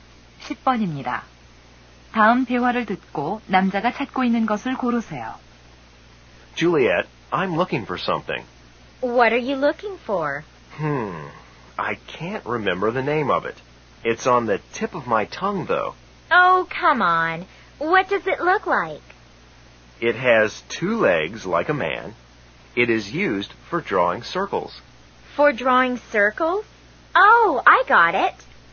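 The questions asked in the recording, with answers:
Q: 다음 대화를 듣고 남자가 찾고 있는 것을 고르세요.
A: 컴퍼스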